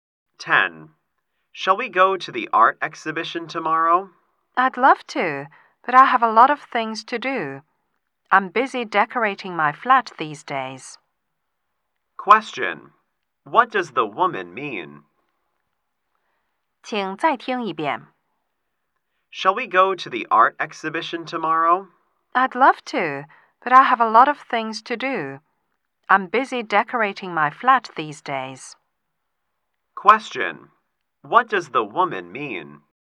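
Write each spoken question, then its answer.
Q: What does the woman mean?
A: She can't go to the exhibition because she's busy decorating her flat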